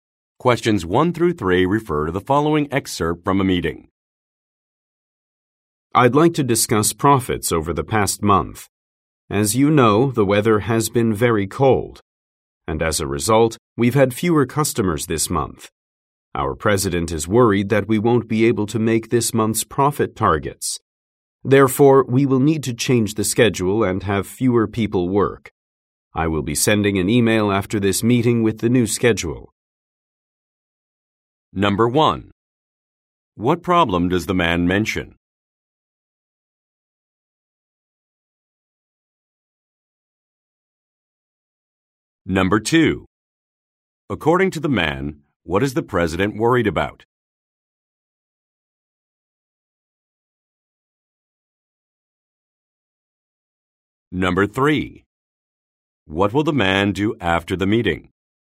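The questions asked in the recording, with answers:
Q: What problem does the man mention?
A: Fewer customers because of the cold weather

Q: According to the man, what is the president worried about?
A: Not meeting this month's profit targets

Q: What will the man do after the meeting?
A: Send an email with the new schedule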